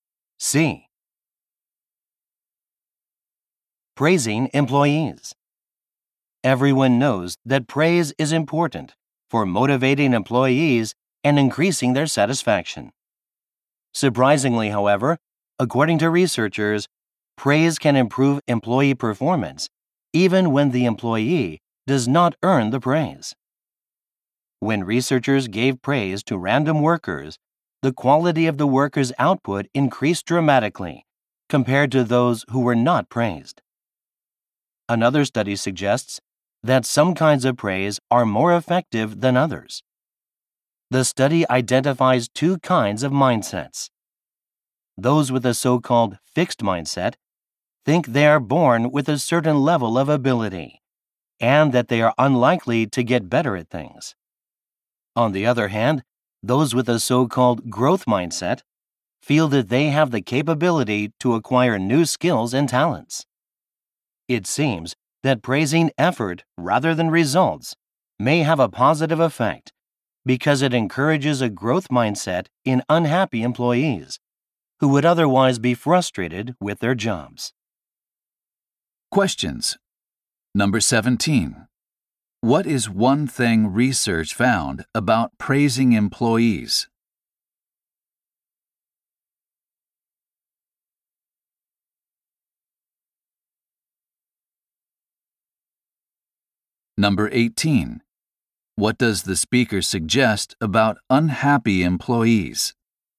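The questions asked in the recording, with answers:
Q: What is one thing research found about praising employees?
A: Even unearned praise improves performance

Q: What does the speaker suggest about unhappy employees?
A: Praising their effort may encourage a growth mindset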